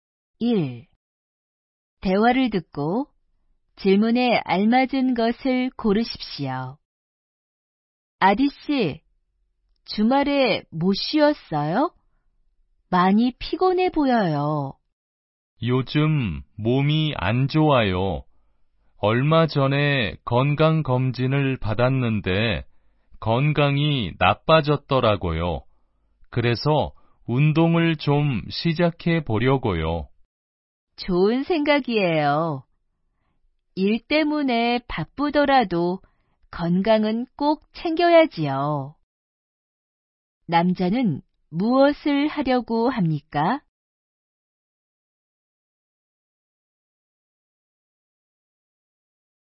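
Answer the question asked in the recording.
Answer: 운동을 시작하려고 합니다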